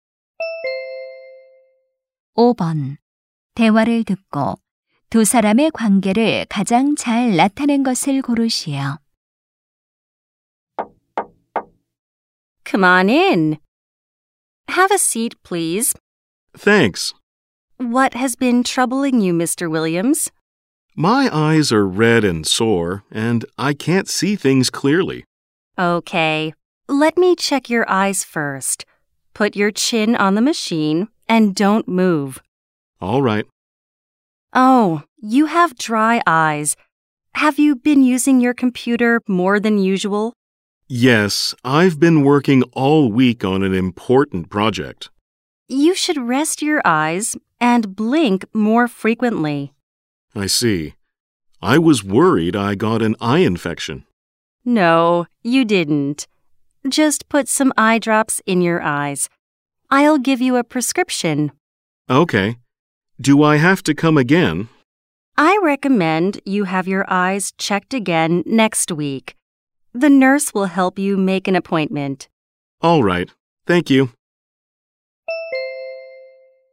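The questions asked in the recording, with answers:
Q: 대화를 듣고 두 사람의 관계를 가장 잘 나타낸 것을 고르시오.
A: 안과 의사 - 환자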